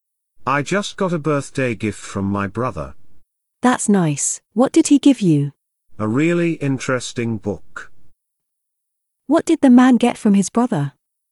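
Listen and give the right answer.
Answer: a book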